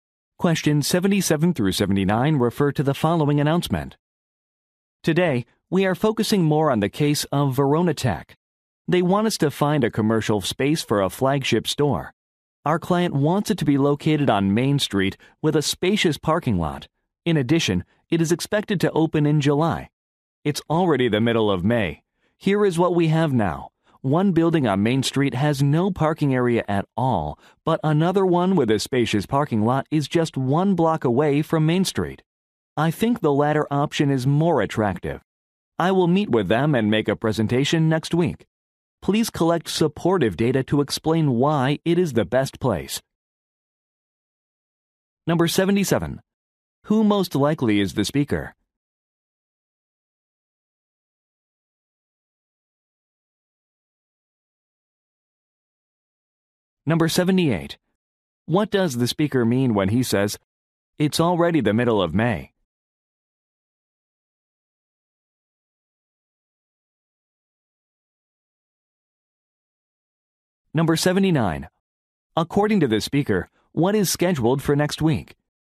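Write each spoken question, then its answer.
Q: What does the speaker mean when he says, "It's already the middle of May"?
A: There is little time left before the July opening

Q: According to the speaker, what is scheduled for next week?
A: A meeting and presentation with the client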